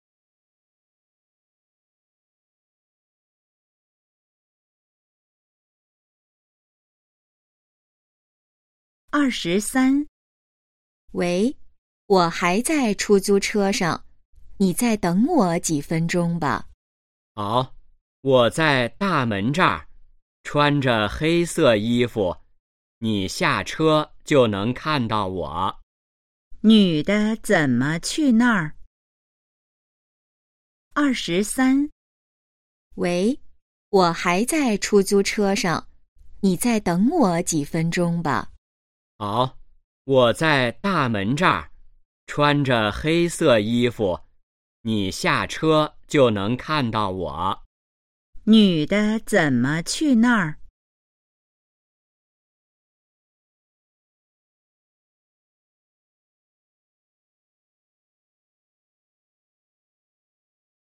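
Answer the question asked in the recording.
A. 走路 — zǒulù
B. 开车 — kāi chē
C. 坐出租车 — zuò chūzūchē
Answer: C. 坐出租车 — zuò chūzūchē

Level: HSK2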